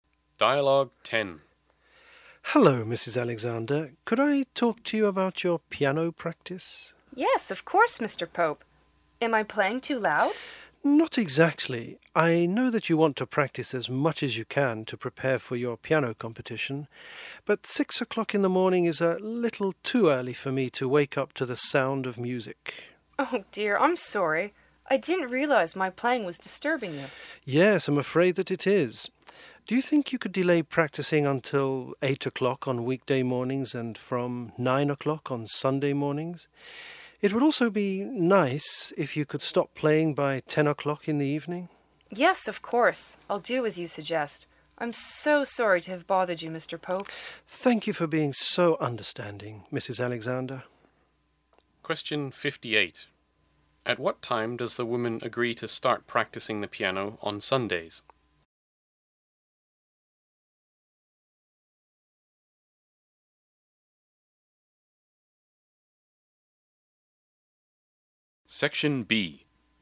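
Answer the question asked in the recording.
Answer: 9 o'clock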